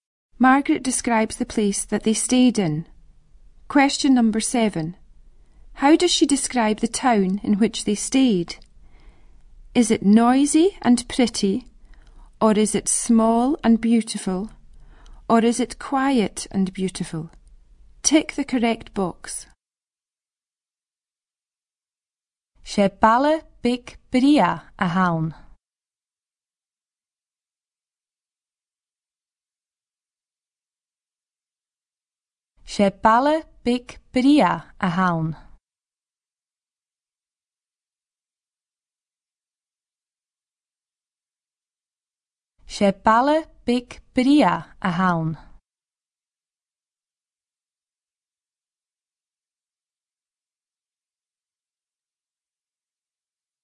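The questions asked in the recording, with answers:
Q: How does she describe the town in which they stayed? Is it noisy and pretty,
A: B: small and beautiful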